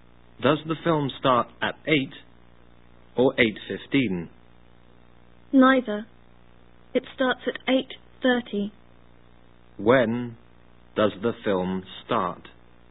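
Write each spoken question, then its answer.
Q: When does the film start?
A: At 8:30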